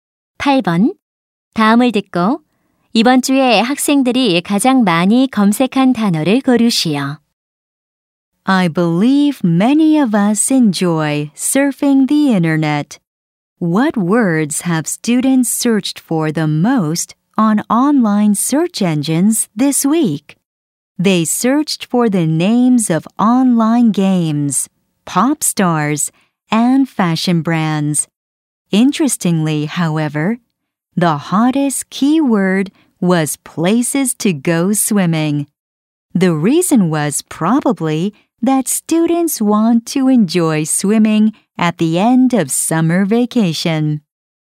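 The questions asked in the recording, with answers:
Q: 다음을 듣고 이번 주에 학생들이 가장 많이 검색한 단어를 고르시오.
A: 수영하러 갈 장소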